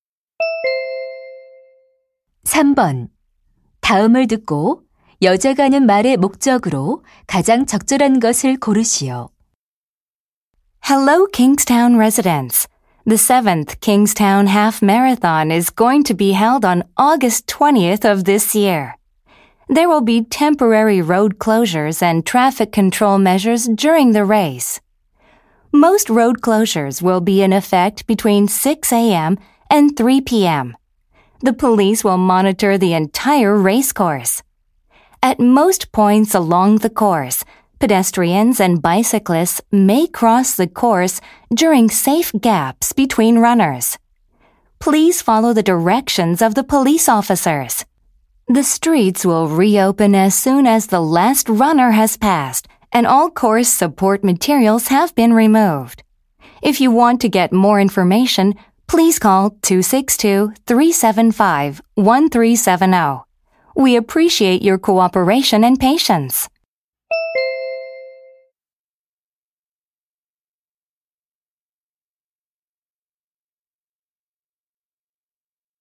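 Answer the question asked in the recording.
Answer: 마라톤 대회로 인한 도로 통제를 안내하려고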